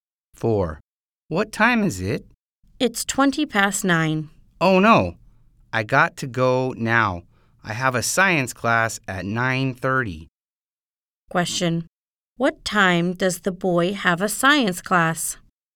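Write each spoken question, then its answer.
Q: What time does the boy have a science class?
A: At 9:30.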